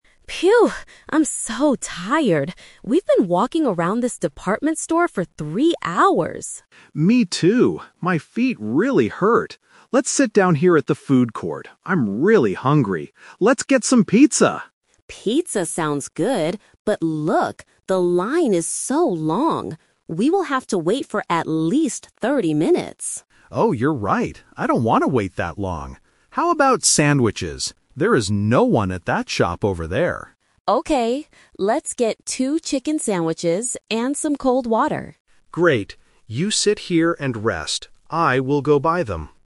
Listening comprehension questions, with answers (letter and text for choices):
Listen to the conversation and choose the correct answer (A, B, or C) for each question.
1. Why do Sarah and John decide to sit down?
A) Because they want to wait for a friend.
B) Because they are tired from walking.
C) Because the department store is closing.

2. Why don't they buy pizza?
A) Because the line is too long.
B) Because it is too expensive.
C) Because Sarah doesn't like pizza.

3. What will John buy for them?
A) Pizza and cola.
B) Beef sandwiches and hot coffee.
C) Chicken sandwiches and cold water.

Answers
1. B) Because they are tired from walking.
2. A) Because the line is too long.
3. C) Chicken sandwiches and cold water.

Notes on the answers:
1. Sarah says, "I'm so tired. We've been walking around... for three hours," and John agrees that his feet hurt. Why the trap is wrong: Options (A) and (C) are plausible reasons to sit in a mall, but they are never mentioned in the audio.
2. Sarah points out that "the line is so long" and they would have to wait for 30 minutes. John agrees he doesn't want to wait. Why the trap is wrong: Option (C) is a trap. Sarah actually says "Pizza sounds good", so she likes it. Option (B) is a common reason not to buy something, but they didn't talk about money.
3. This is "The Twist". They wanted pizza first, but changed their minds. Sarah suggests, "let's get two chicken sandwiches and some cold water," and John agrees to go buy them. Why the trap is wrong: Option (A) is the trap because pizza was their first choice before they changed their plan. Option (B) has the wrong type of meat and drink.

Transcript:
Sarah: Phew! I'm so tired. We've been walking around this department store for three hours.
John: Me too. My feet really hurt. Let's sit down here at the food court. I'm really hungry. Let's get some pizza!
Sarah: Pizza sounds good, but look... the line is so long! We will have to wait for at least thirty minutes.
John: Oh, you're right. I don't want to wait that long. How about sandwiches? There is no one at that shop over there.
Sarah: Okay, let's get two chicken sandwiches and some cold water.